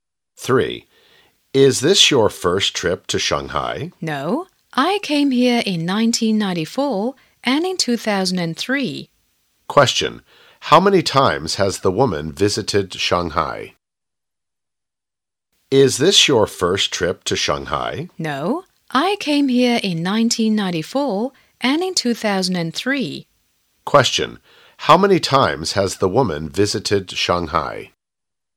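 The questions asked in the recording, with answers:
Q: How many times has the woman visited Shanghai?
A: Twice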